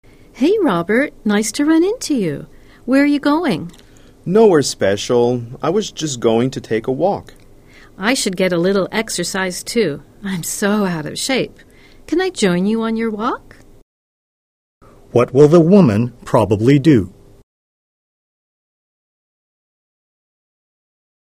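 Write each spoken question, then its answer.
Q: What will the woman probably do?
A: Go for a walk with Robert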